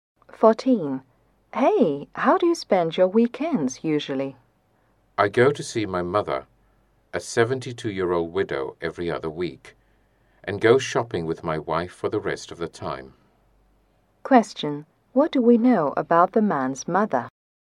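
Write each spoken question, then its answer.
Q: What do we know about the man's mother?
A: She is a 72-year-old widow.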